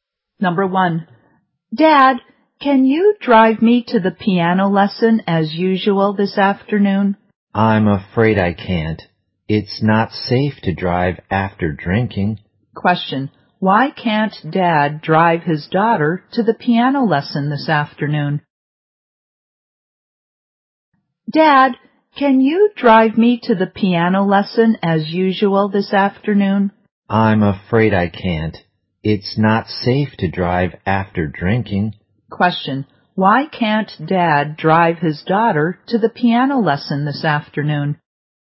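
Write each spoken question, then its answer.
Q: why can't Dad drive his daughter to the piano lesson this afternoon?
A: He has been drinking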